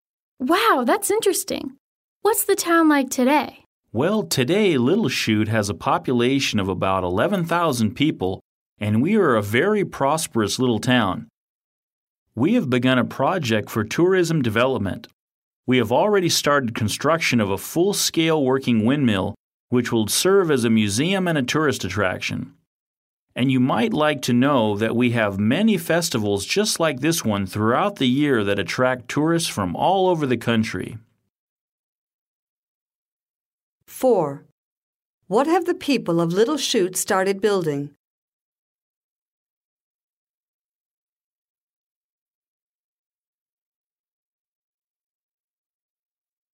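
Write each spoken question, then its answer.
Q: What have the people of Little Chute started building?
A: A full-scale working windmill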